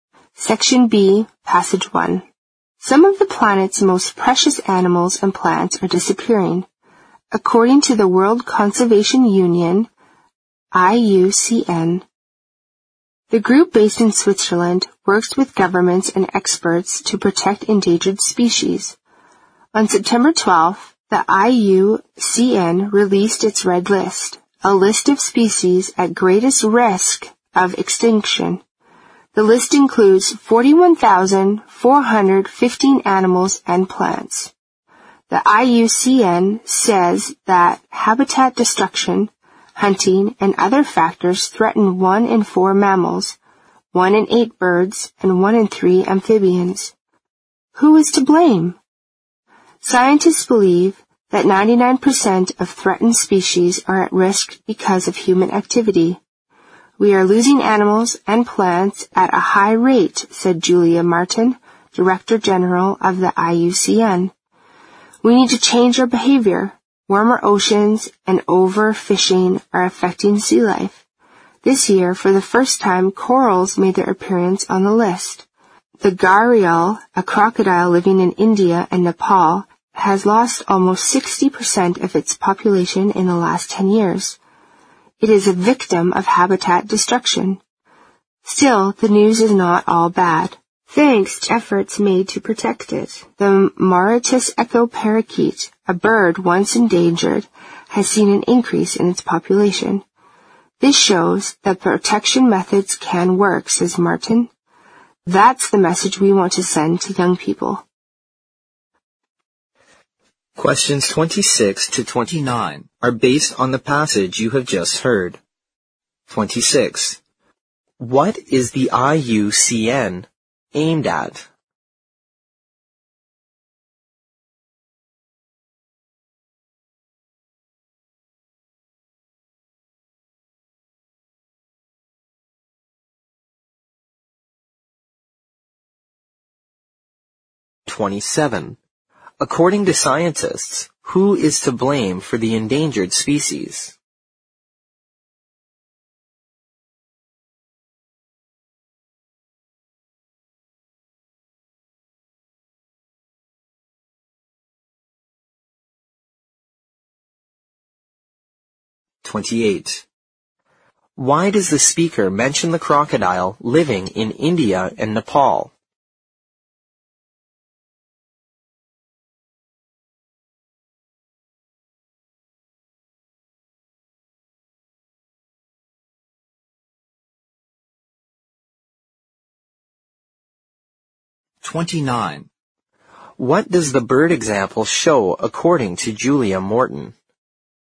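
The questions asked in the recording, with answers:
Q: What is the IUCN aimed at?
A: Protecting endangered species

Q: According to scientists, who is to blame for the endangered species?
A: Humans / human activity

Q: Why does the speaker mention the crocodile living in India and Nepal?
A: To show that habitat destruction threatens species; it lost almost 60% of its population in 10 years

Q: What does the bird example show according to Julia Martin?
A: Protection methods can work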